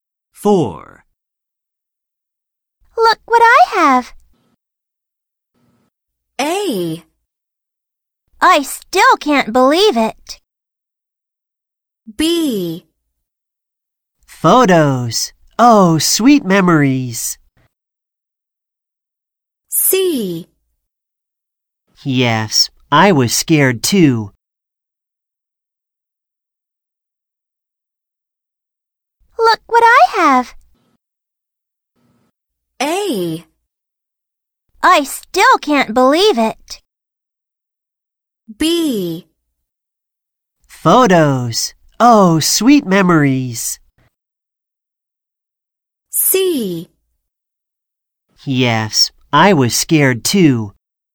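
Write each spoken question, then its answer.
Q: Look what I have.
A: B: Photos. Oh, sweet memories.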